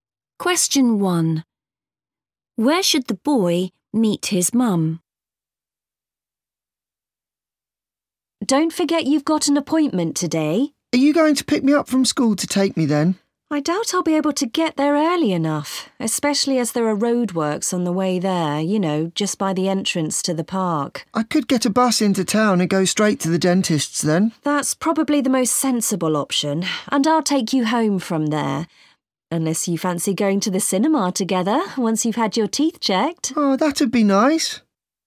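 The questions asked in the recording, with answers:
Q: Where should the boy meet his mum?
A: At the dentist's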